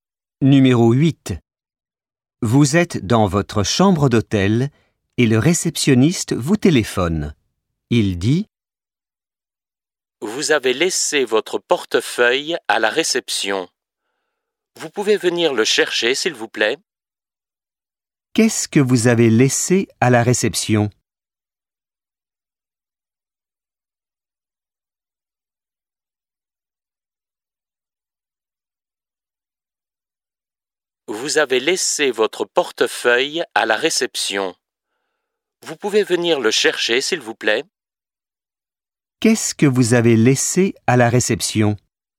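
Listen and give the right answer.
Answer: Votre portefeuille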